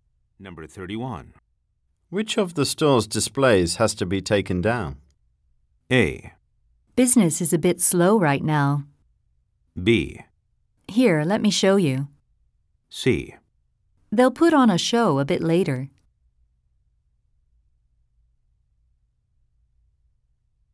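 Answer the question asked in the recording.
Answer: B: Here, let me show you.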